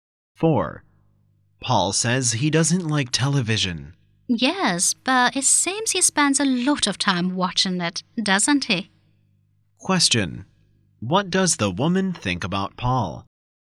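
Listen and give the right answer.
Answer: He says he doesn't like TV, but he actually watches a lot of it.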